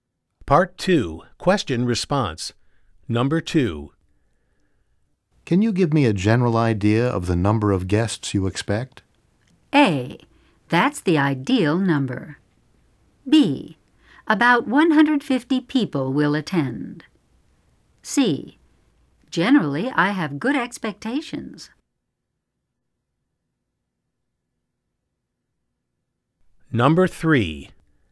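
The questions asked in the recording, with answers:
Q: Can you give me a general idea of the number of guests you expect?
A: B: About 150 people will attend.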